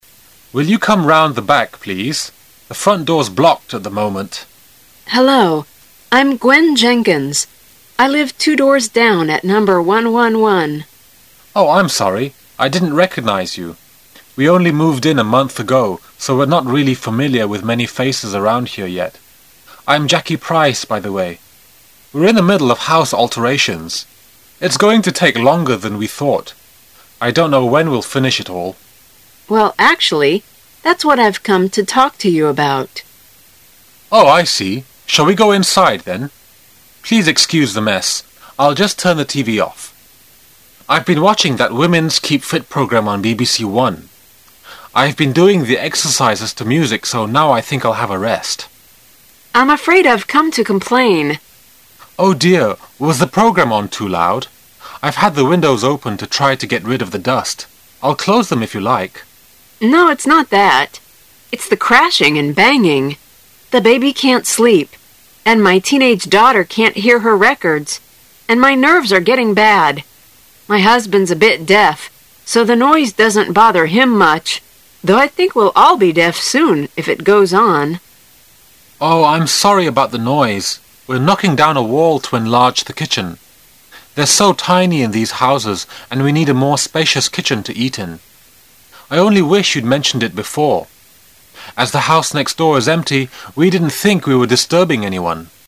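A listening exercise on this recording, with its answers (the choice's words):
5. Jackie has been watching a TV programme about ______.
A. women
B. music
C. exercising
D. entertainment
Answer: exercising

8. What are Jackit and her husband busy with?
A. Making the kitchen bigger.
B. Knocking down a garden wall,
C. Building a new kitchen.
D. Making the kitchen smaller.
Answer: Making the kitchen bigger.

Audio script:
[听力原文] 16-20 Jackit: Will you come round the back, please? The front door's blocked at the moment. Gwen. Hello, I'm Gwen Jenkins. I live two doors down at Number 111. Jackit: Oh, I'm sorry. I didn't recognise you. We only moved in a month ago, so we're no really familiar with many faces around here yet. I'm Jackie Price, by the way. We're in the middle of house alterations. It's going to take longer than we thought. I don' t know when we'll finish it all. Gwen: Well actually, that's what I've come to talk to you about. 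Jackit: Oh, I see. Shall we go inside then? Please excuse the mess! I'll just turn the TV off. I've been watching that women's keep-fit programme on BBC 1. I've been doing the exercises to music so now I think I'll have a rest! Gwen: I'm afraid I've come to complain. Jackit: Oh, dear. Was the programme on too loud? I've had the windows open to try to get rid of the dust. I'll close them if you like. Gwen: No, it's not that. It's the crashing and banging. The baby can't sleep, my teenage daughter can't hear her records and my nerves are getting bad. My husband's a bit deaf so the noise doesn't bother him much, though I think we'll all be deaf soon if it goes on. Jackit: Oh, I'm sorry about the noise. We're knocking down a wall to enlarge the kitchen. They're so tiny in these houses and we need a more spacious kitchen to eat in. I only wish you'd mentioned it before. As the house next door is empty we didn't think we were disturbing anyone.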